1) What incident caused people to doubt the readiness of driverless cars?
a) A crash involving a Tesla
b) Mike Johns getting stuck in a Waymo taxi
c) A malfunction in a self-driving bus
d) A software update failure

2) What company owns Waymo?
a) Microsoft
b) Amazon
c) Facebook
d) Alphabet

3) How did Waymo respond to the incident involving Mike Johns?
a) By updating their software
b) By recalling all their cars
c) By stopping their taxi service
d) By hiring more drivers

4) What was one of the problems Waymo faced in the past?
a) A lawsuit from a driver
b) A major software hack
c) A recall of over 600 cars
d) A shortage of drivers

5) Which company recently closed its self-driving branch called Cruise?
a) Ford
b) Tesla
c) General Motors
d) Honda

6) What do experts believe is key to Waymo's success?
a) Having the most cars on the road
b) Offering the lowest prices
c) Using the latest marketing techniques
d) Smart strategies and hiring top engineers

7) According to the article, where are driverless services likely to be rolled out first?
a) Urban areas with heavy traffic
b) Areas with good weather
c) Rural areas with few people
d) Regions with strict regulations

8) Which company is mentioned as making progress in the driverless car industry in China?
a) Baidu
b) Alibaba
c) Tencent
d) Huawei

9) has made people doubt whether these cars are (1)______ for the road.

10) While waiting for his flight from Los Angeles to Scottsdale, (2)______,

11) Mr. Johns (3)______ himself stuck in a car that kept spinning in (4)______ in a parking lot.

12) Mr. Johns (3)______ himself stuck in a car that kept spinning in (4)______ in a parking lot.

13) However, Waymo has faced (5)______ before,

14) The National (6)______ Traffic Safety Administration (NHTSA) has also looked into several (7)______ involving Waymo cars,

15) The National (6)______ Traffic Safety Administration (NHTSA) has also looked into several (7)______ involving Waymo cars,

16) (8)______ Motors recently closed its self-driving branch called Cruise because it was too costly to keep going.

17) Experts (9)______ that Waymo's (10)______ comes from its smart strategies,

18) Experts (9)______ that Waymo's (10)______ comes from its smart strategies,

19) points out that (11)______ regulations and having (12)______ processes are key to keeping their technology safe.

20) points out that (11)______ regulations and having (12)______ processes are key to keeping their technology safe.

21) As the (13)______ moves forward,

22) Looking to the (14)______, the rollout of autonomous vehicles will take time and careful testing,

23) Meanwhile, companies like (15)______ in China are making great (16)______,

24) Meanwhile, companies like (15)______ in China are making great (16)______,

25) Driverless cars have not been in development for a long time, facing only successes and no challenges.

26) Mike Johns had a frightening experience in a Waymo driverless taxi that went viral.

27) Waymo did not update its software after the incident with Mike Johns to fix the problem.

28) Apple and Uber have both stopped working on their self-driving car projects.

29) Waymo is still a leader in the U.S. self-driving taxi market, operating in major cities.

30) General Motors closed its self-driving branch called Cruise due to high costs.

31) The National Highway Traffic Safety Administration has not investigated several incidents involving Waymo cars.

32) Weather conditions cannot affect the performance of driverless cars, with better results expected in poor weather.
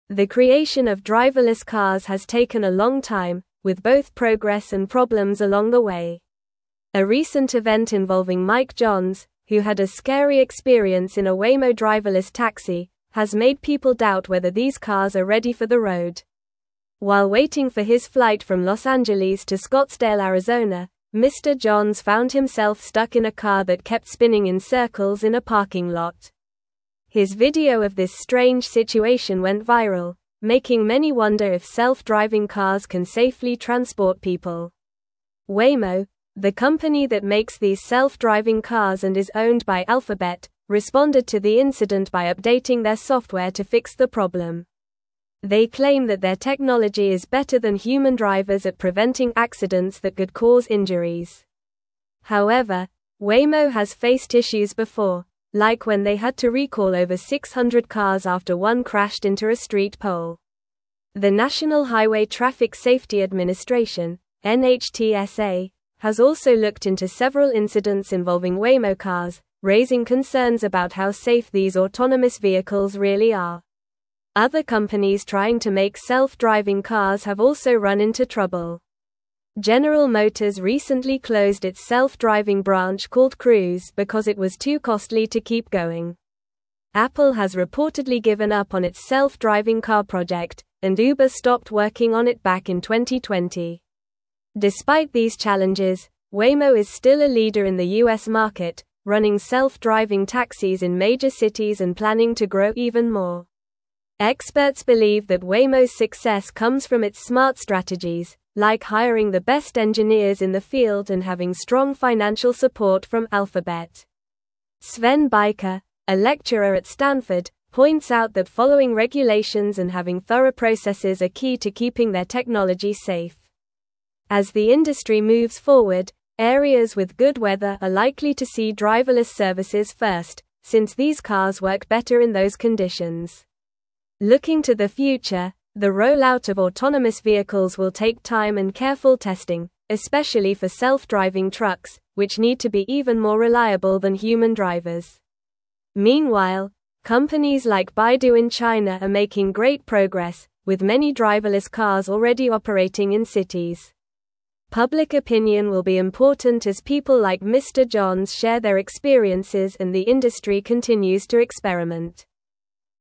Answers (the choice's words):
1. Mike Johns getting stuck in a Waymo taxi
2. Alphabet
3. By updating their software
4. A recall of over 600 cars
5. General Motors
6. Smart strategies and hiring top engineers
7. Areas with good weather
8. Baidu
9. ready
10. Arizona
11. found
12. circles
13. issues
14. Highway
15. incidents
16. General
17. believe
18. success
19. following
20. thorough
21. industry
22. future
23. Baidu
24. progress
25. False
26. True
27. False
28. True
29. True
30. True
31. False
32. False

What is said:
The creation of driverless cars has taken a long time, with both progress and problems along the way. A recent event involving Mike Johns, who had a scary experience in a Waymo driverless taxi, has made people doubt whether these cars are ready for the road. While waiting for his flight from Los Angeles to Scottsdale, Arizona, Mr. Johns found himself stuck in a car that kept spinning in circles in a parking lot. His video of this strange situation went viral, making many wonder if self-driving cars can safely transport people.
Waymo, the company that makes these self-driving cars and is owned by Alphabet, responded to the incident by updating their software to fix the problem. They claim that their technology is better than human drivers at preventing accidents that could cause injuries. However, Waymo has faced issues before, like when they had to recall over 600 cars after one crashed into a street pole. The National Highway Traffic Safety Administration (NHTSA) has also looked into several incidents involving Waymo cars, raising concerns about how safe these autonomous vehicles really are.
Other companies trying to make self-driving cars have also run into trouble. General Motors recently closed its self-driving branch called Cruise because it was too costly to keep going. Apple has reportedly given up on its self-driving car project, and Uber stopped working on it back in 2020. Despite these challenges, Waymo is still a leader in the U.S. market, running self-driving taxis in major cities and planning to grow even more.
Experts believe that Waymo's success comes from its smart strategies, like hiring the best engineers in the field and having strong financial support from Alphabet. Sven Beiker, a lecturer at Stanford, points out that following regulations and having thorough processes are key to keeping their technology safe. As the industry moves forward, areas with good weather are likely to see driverless services first, since these cars work better in those conditions. Looking to the future, the rollout of autonomous vehicles will take time and careful testing, especially for self-driving trucks, which need to be even more reliable than human drivers. Meanwhile, companies like Baidu in China are making great progress, with many driverless cars already operating in cities. Public opinion will be important as people like Mr. Johns share their experiences and the industry continues to experiment.

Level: Level 3